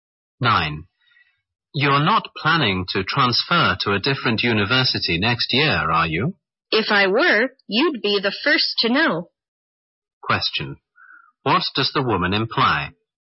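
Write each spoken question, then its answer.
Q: What does the woman imply?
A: She is not planning to transfer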